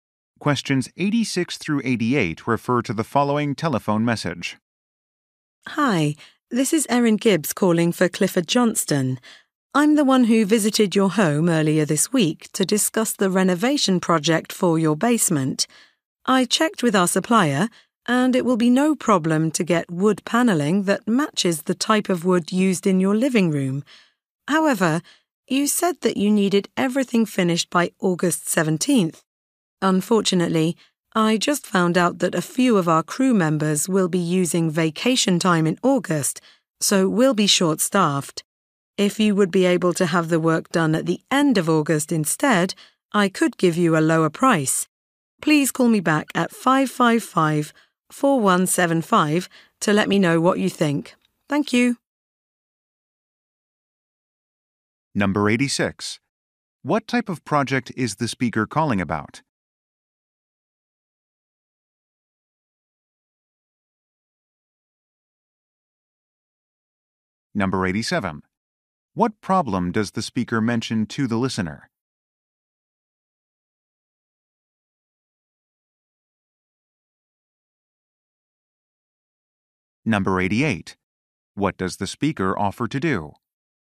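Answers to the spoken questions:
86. A basement renovation
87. They will be short-staffed in August
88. Give a lower price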